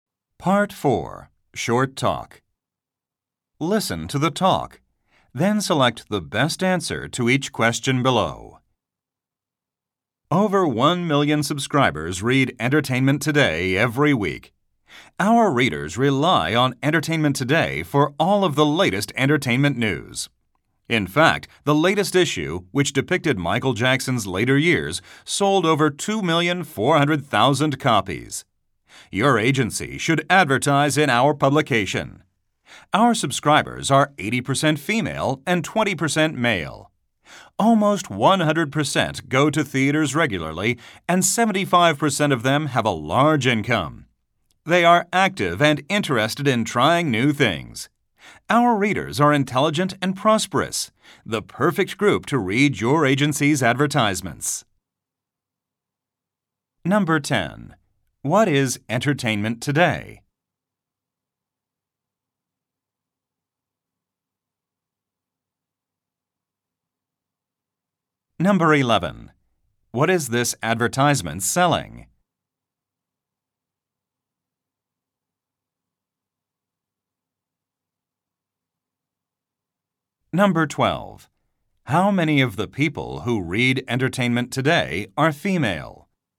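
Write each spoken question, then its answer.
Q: What is Entertainment Today?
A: A weekly entertainment news publication (magazine)

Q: What is this advertisement selling?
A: Advertising space in the publication

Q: How many of the people who read Entertainment Today are female?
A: 80%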